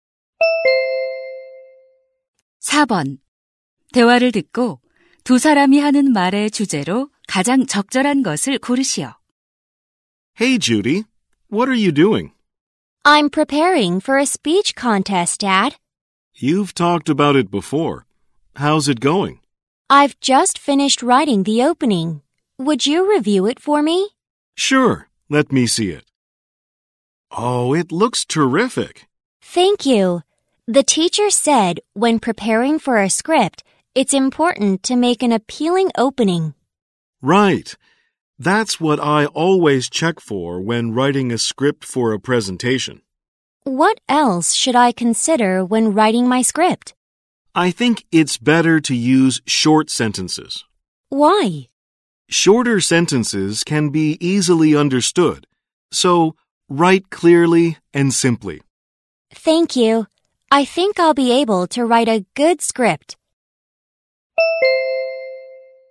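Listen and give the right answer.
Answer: 연설 원고를 잘 쓰는 방법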